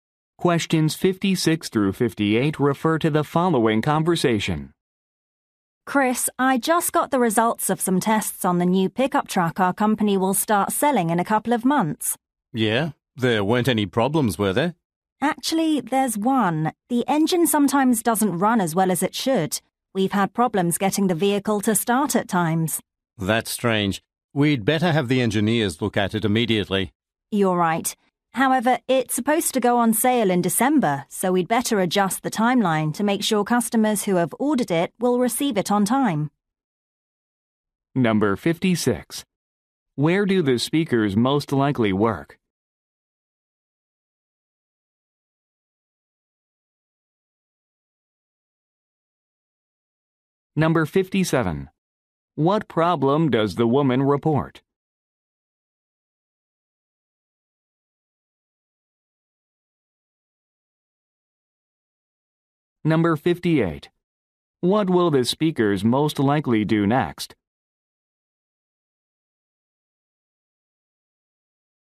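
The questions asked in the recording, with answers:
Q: Where do the speakers most likely work?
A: At a vehicle manufacturer.

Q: What problem does the woman report?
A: The truck's engine sometimes doesn't start or run well.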